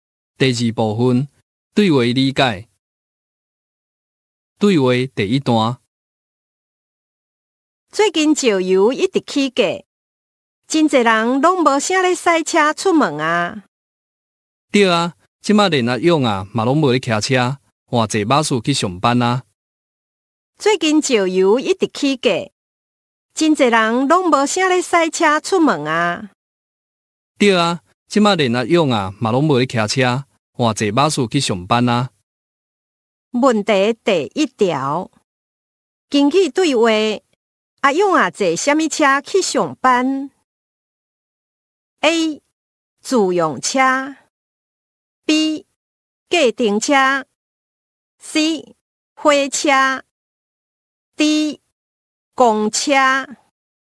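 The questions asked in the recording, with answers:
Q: 根据对话,阿勇啊坐啥物车去上班 ?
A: D: 公车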